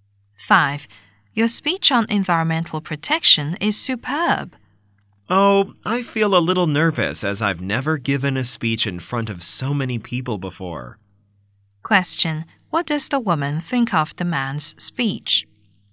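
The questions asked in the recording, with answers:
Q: What does the woman think of the man's speech?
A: It is superb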